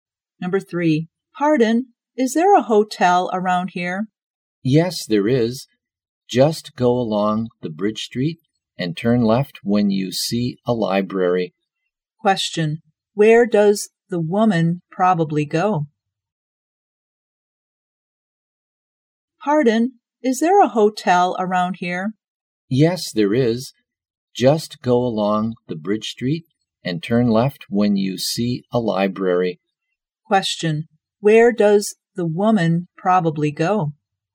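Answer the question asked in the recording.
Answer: A hotel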